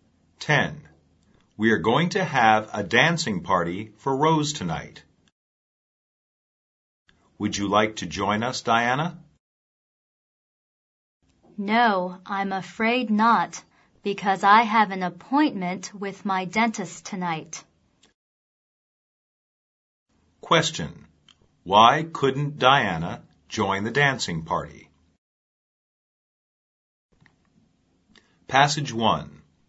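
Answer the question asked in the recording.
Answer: She has an appointment with her dentist.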